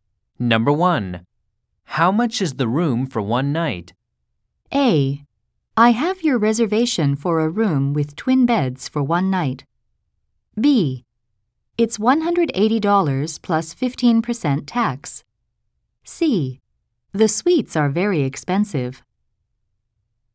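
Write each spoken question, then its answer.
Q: How much is the room for one night?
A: B: It's $180 plus 15% tax.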